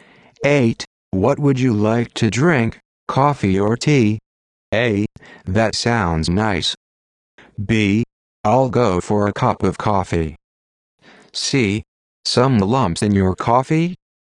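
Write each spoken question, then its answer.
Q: What would you like to drink, coffee or tea?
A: B: I'll go for a cup of coffee.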